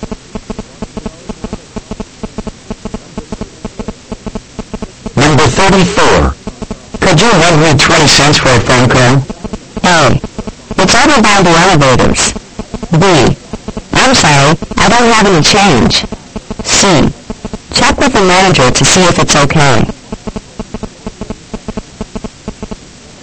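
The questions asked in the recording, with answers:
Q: Could you lend me 20 cents for a phone call?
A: B: I'm sorry, I don't have any change.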